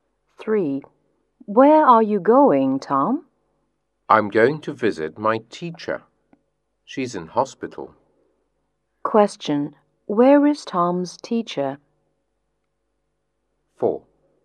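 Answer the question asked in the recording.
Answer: In hospital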